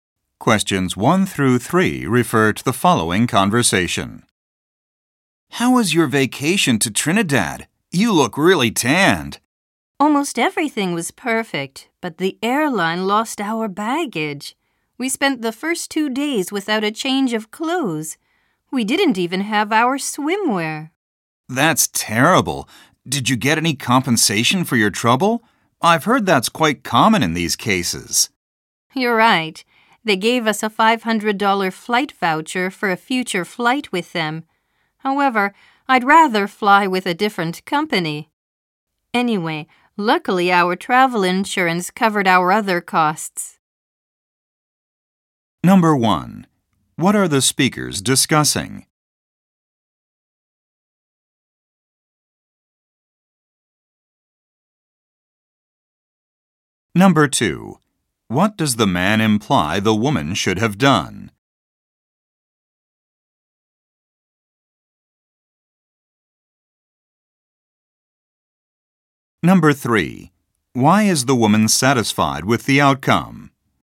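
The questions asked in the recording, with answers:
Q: What are the speakers discussing?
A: The woman's vacation to Trinidad, where the airline lost their baggage

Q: Why is the woman satisfied with the outcome?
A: Her travel insurance covered her other costs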